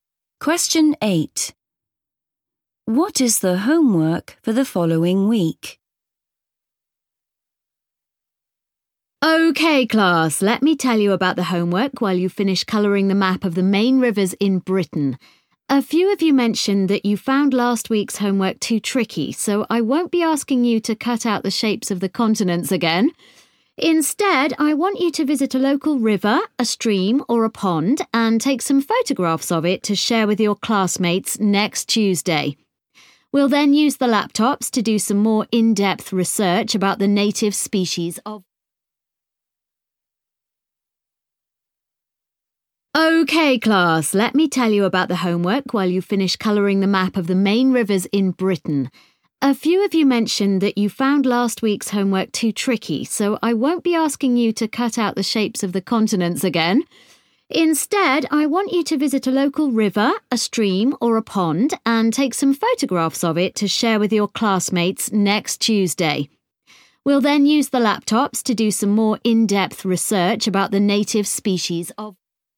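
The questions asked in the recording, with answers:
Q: What is the homework for the following week?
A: Take photographs of a local river, stream or pond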